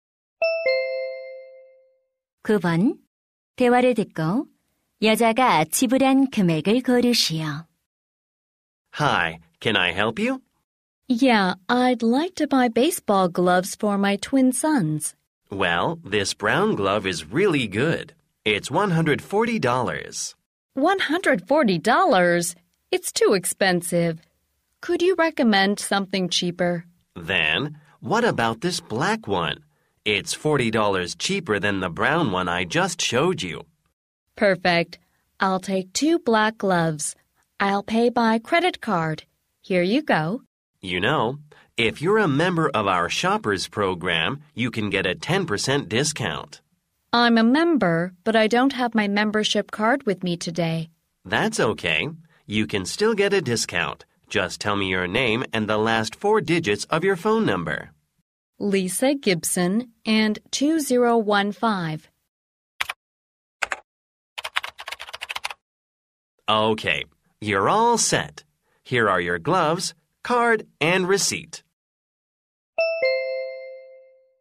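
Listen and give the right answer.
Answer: $180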